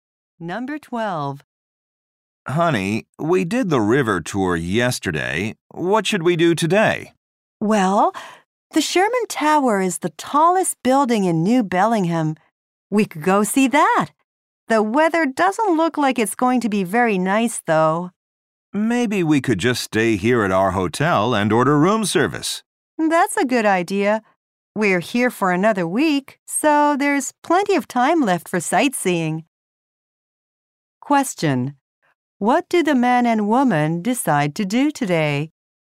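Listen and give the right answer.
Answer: Stay at their hotel and order room service.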